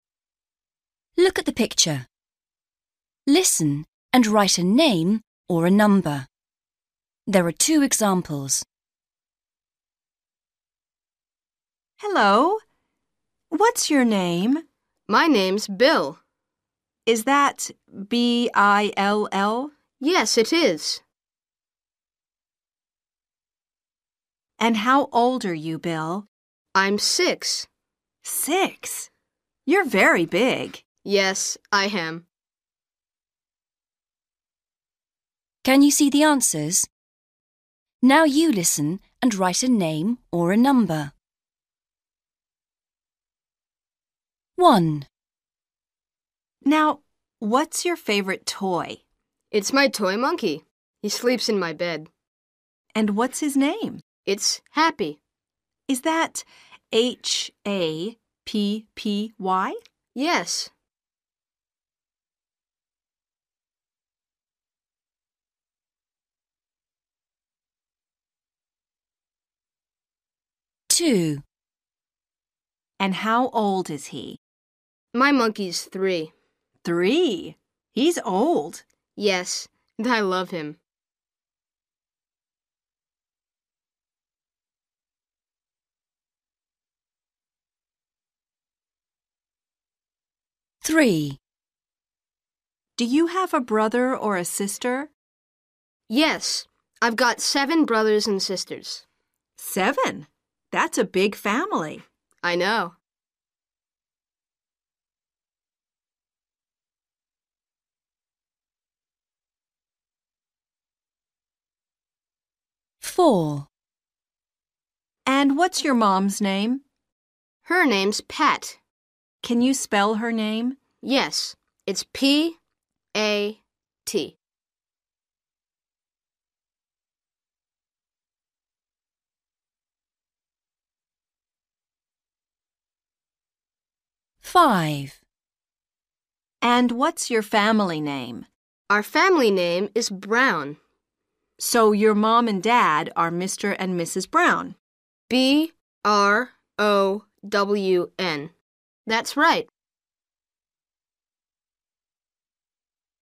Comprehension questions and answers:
Read the question. Listen and write a name or a number.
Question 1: What's the name of Bill's toy monkey? ...........................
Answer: Happy

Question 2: How old is Bill's toy monkey? ...........................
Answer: 3/three

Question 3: How many brothers and sisters has Bill got? ...........................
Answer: 7/seven

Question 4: What is Bill's mum's name? ...........................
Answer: Pat

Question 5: What's Bill's family name? ...........................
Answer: Brown

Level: Starters